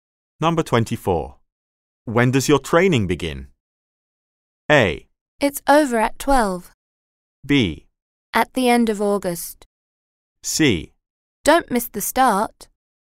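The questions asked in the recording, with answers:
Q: When does your training begin?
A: B: At the end of August.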